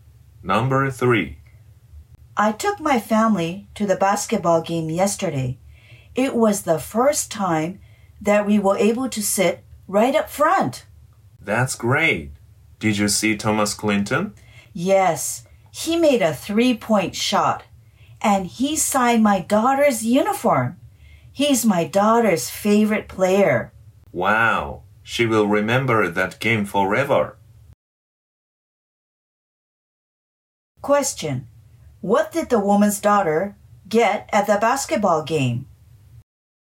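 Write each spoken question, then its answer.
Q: What did the woman's daughter get at the basketball game?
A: Thomas Clinton's signature on her uniform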